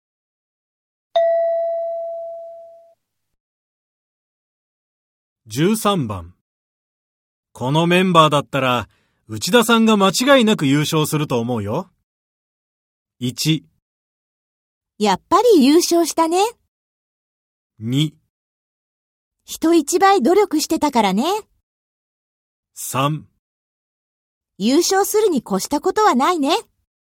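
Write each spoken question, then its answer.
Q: このメンバーだったら、内田さんが間違いなく優勝すると思うよ。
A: 2: 人一倍努力してたからね。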